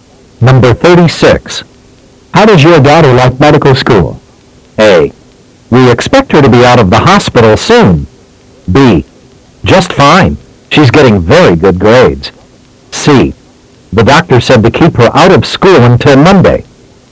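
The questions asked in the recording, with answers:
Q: How does your daughter like medical school?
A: B: Just fine. She's getting very good grades.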